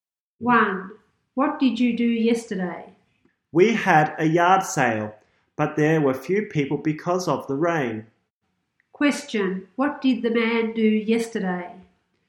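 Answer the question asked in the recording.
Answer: He had a yard sale.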